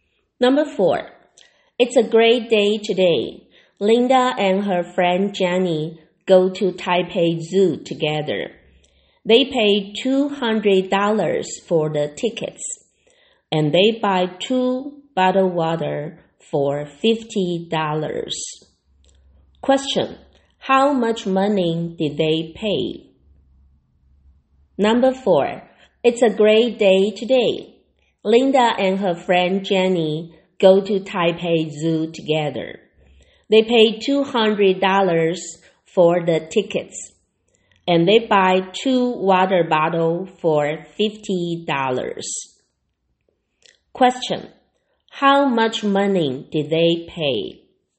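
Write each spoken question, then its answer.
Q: How much money did they pay?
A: $250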